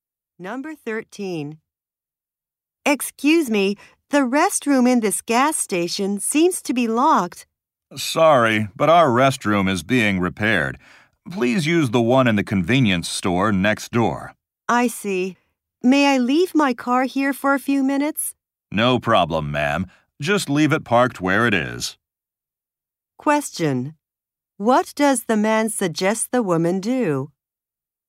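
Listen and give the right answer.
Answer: Use the restroom in the convenience store next door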